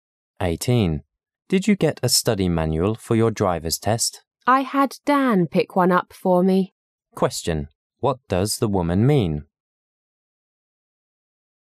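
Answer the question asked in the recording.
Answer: Dan got her a study manual.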